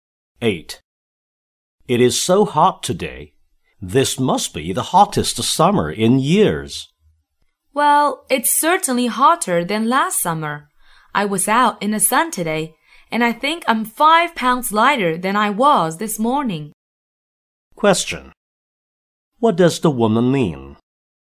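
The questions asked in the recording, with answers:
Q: What does the woman mean?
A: It is very hot and she sweated a lot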